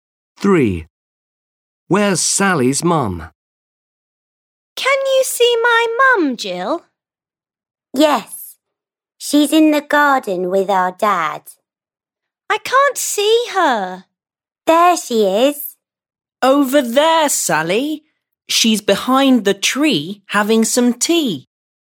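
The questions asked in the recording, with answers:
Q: Where's Sally's mum?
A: in the garden behind the tree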